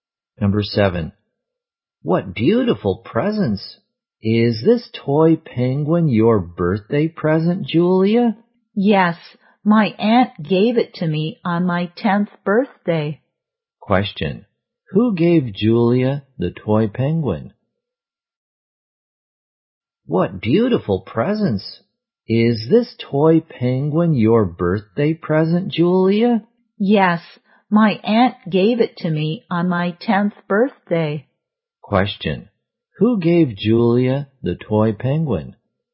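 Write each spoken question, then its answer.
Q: Who gave Julia the toy penguin?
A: Her aunt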